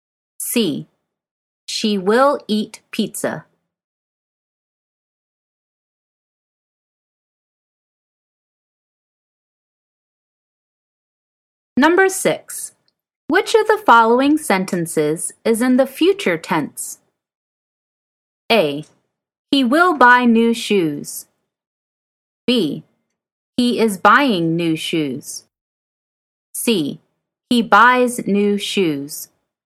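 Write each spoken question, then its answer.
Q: Which of the following sentences is in the future tense?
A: A: He will buy new shoes.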